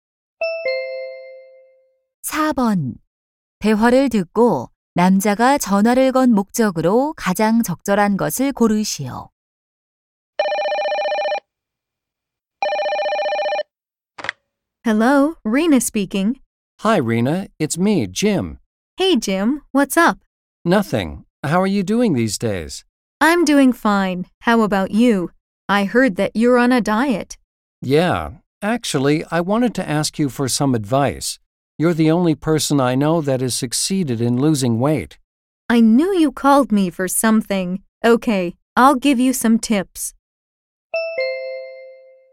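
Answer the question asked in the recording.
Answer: 다이어트에 대한 조언을 구하려고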